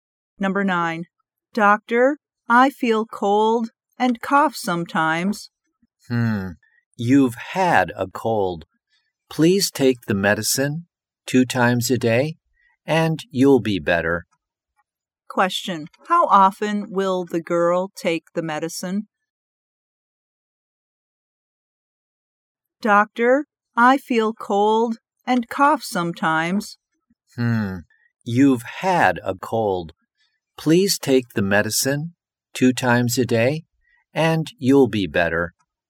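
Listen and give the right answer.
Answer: Twice a day.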